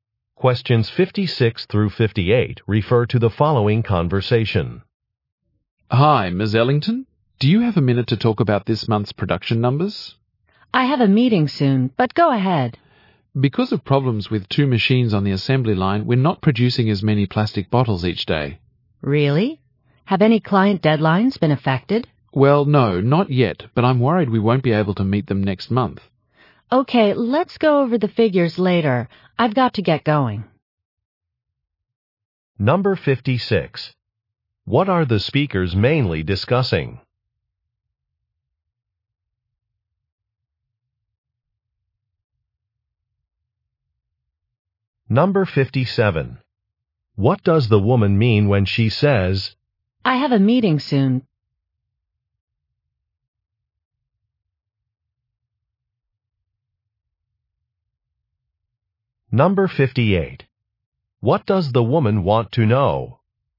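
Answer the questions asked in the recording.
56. This month's production numbers
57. She has only a little time to talk
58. Whether any client deadlines have been affected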